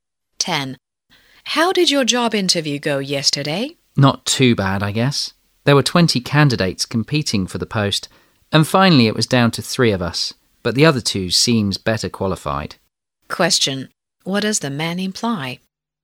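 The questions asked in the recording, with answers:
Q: What does the man imply?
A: He probably won't get the job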